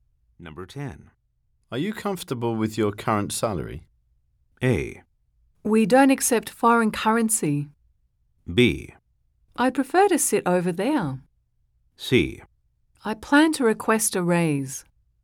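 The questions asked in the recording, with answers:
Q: Are you comfortable with your current salary?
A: C: I plan to request a raise.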